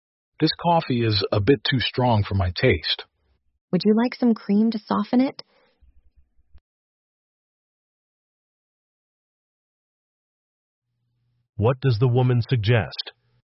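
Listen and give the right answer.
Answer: Adding some cream to the coffee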